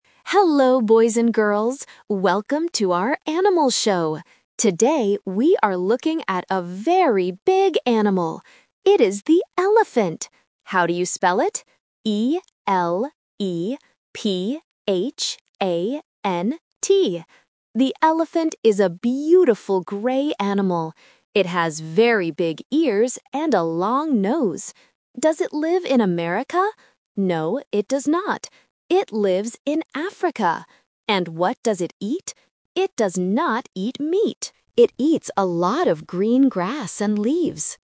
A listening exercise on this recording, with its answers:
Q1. What animal does the host spell?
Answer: An elephant

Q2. Where does the animal live?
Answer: In Africa

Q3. What does the animal eat?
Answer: Grass and leaves

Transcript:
TV Host: Hello, boys and girls! Welcome to our Animal Show. Today, we are looking at a very big animal. It is the elephant. How do you spell it? E-L-E-P-H-A-N-T. The elephant is a beautiful gray animal. It has very big ears and a long nose. Does it live in America? No, it does not. It lives in Africa. And what does it eat? It does not eat meat. It eats a lot of green grass and leaves.

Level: A1